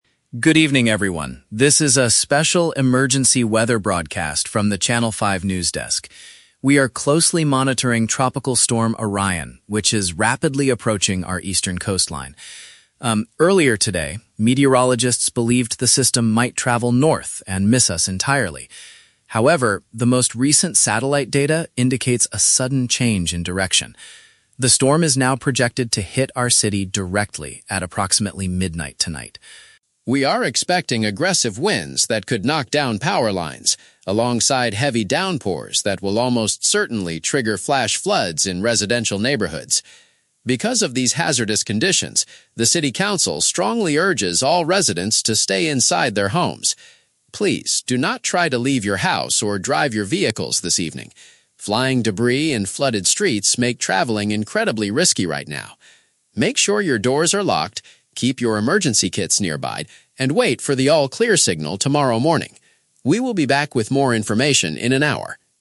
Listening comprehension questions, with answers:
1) What did weather experts originally think the storm would do?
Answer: Travel in a different direction.

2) What is the main danger caused by the heavy downpours?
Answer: They will cause water to fill up local housing areas.

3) What are citizens strongly advised to do tonight?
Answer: Avoid going out on the roads.

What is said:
News Anchor: Good evening, everyone. This is a special emergency weather broadcast from the Channel 5 news desk. We are closely monitoring Tropical Storm Orion, which is rapidly approaching our eastern coastline. Um, earlier today, meteorologists believed the system might travel north and miss us entirely. However, the most recent satellite data indicates a sudden change in direction. The storm is now projected to hit our city directly at approximately midnight tonight.
We are expecting aggressive winds that could knock down power lines, alongside heavy downpours that will almost certainly trigger flash floods in residential neighborhoods. Because of these hazardous conditions, the city council strongly urges all residents to stay inside their homes. Please, do not try to leave your house or drive your vehicles this evening. Flying debris and flooded streets make traveling incredibly risky right now. Make sure your doors are locked, keep your emergency kits nearby, and wait for the all-clear signal tomorrow morning. We will be back with more information in an hour.